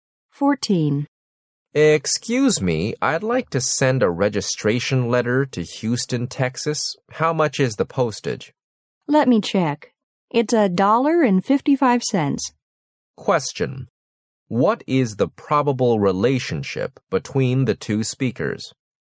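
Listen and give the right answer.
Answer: Post office clerk and customer.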